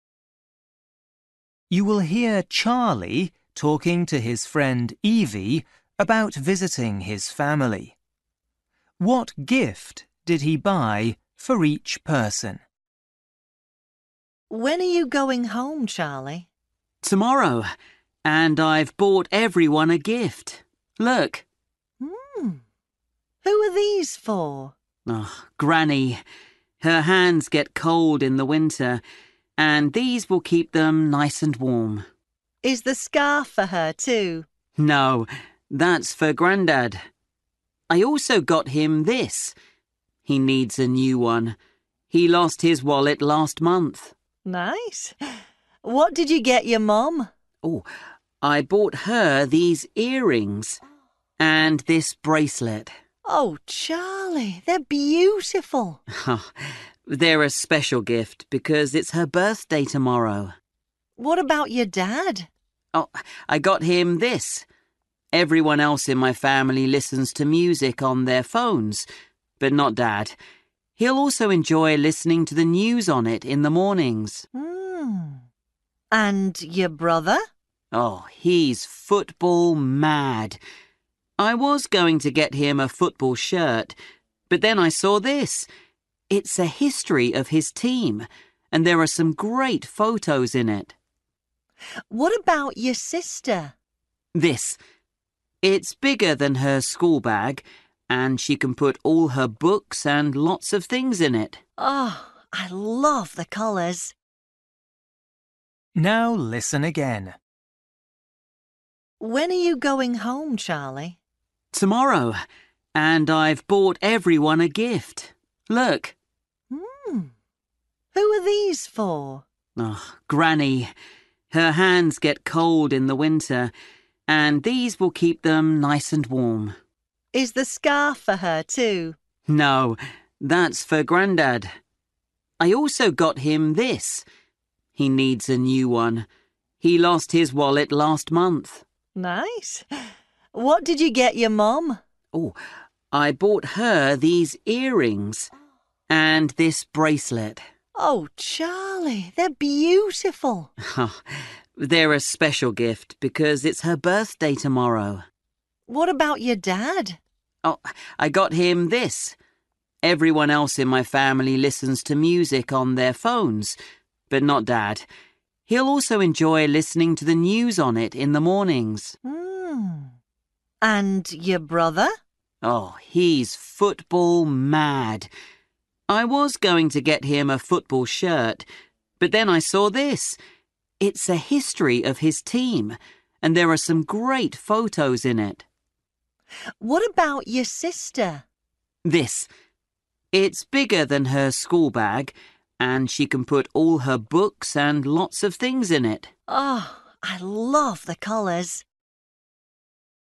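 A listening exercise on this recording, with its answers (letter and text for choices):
For each question, choose the correct answer.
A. digital radio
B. book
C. gloves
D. backpack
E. wallet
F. football shirt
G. jewellery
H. camera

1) grandfather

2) mother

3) father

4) brother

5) sister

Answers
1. E. wallet
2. G. jewellery
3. A. digital radio
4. B. book
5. D. backpack

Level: Luyện nghe trình độ A2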